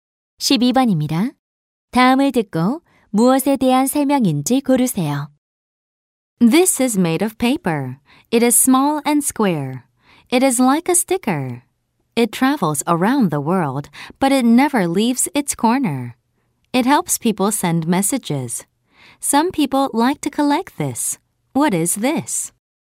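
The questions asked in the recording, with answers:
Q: 다음을 듣고 무엇에 대한 설명인지 고르세요.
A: 우표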